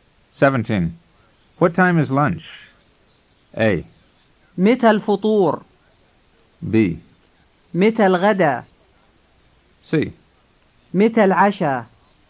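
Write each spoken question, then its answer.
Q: What time is lunch?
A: B: متى الغداء؟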